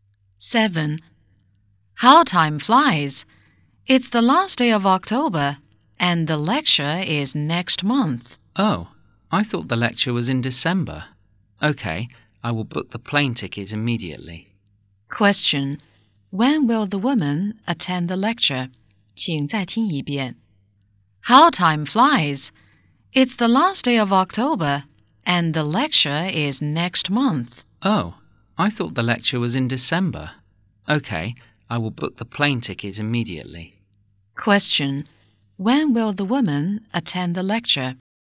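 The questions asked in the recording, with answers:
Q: When will the woman attend the lecture?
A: In November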